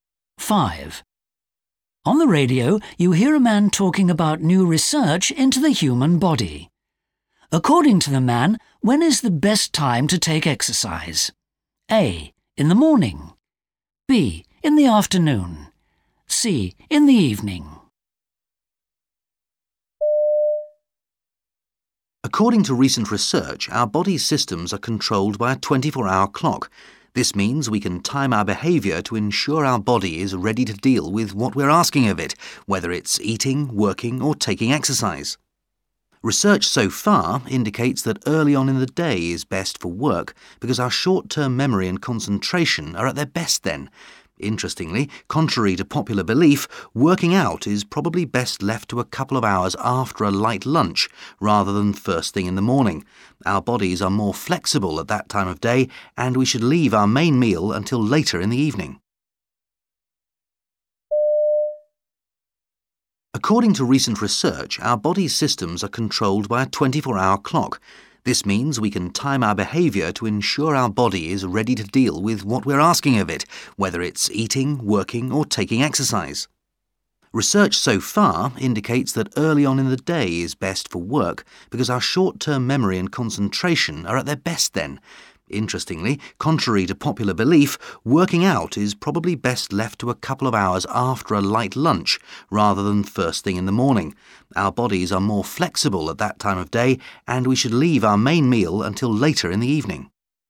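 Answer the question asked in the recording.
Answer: B: In the afternoon.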